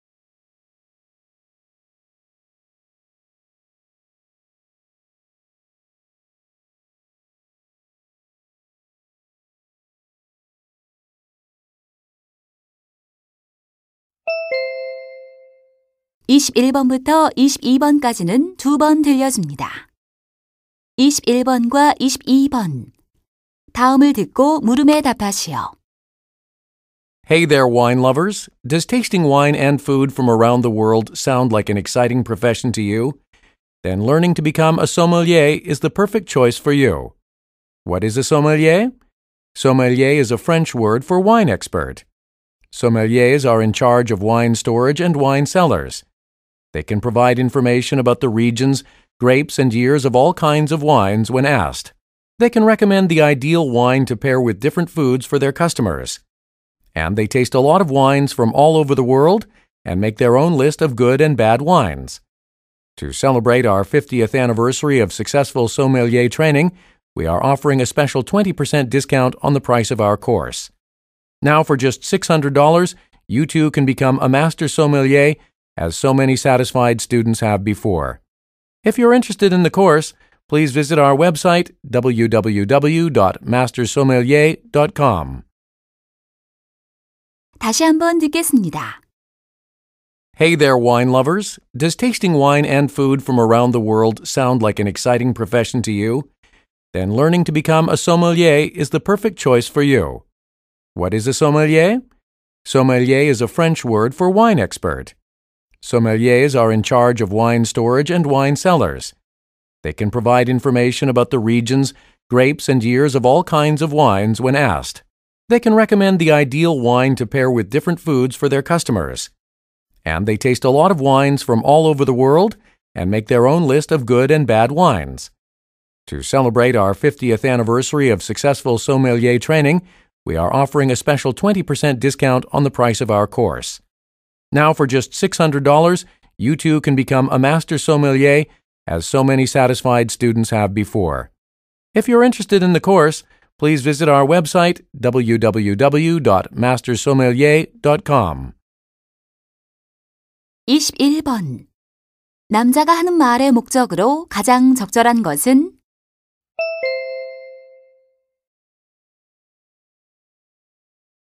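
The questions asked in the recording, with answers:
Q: 남자가 하는 말의 목적으로 가장 적절한 것은?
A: 소믈리에 양성 과정을 홍보하려고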